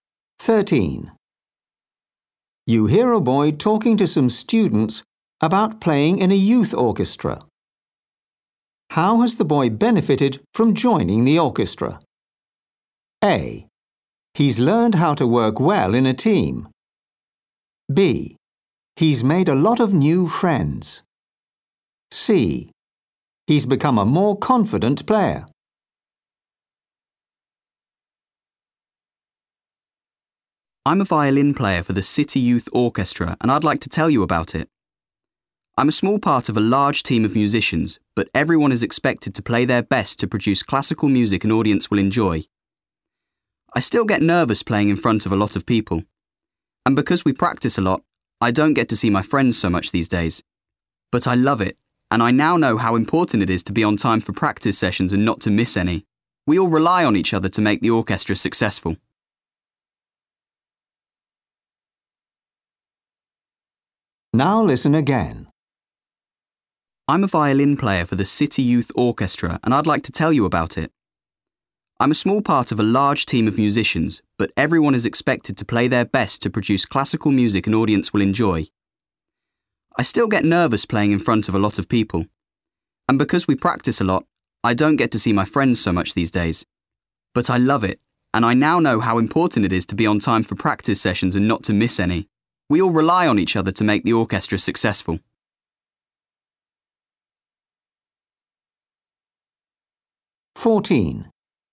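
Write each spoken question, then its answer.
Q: How has the boy benefited from joining the orchestra?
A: A: He's learned how to work well in a team.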